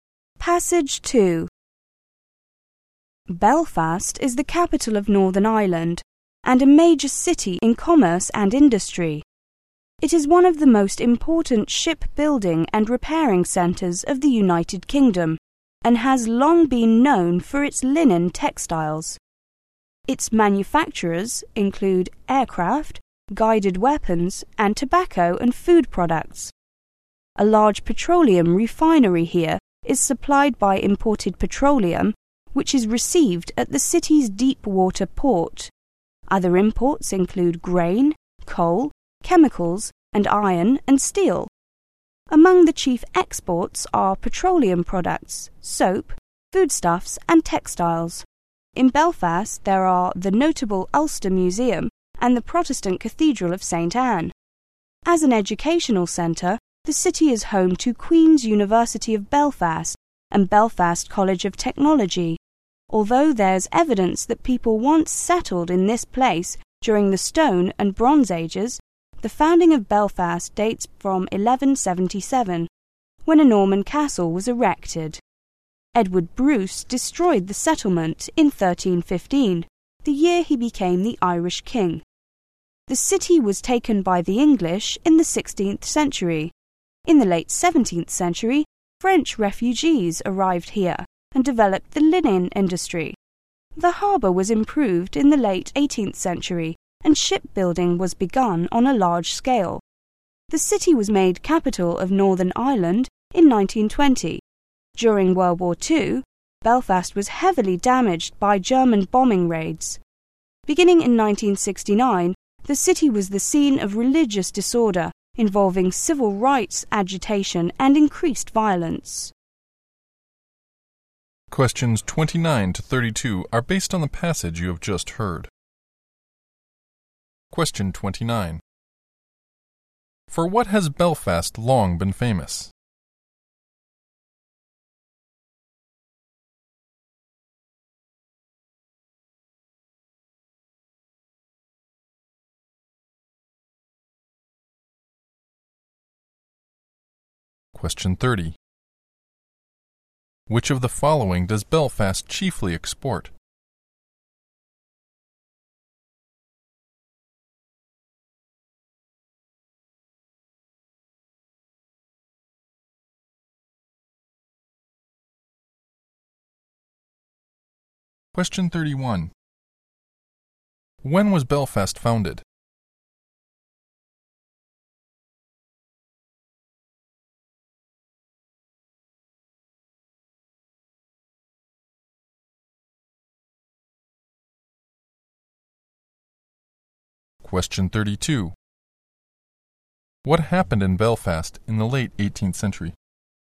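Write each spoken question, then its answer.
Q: For what has Belfast long been famous?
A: Its linen textiles

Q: Which of the following does Belfast chiefly export?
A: Petroleum products, soap, foodstuffs and textiles

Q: When was Belfast founded?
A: In 1177

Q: What happened in Belfast in the late 18th century?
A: The harbour was improved and large-scale shipbuilding began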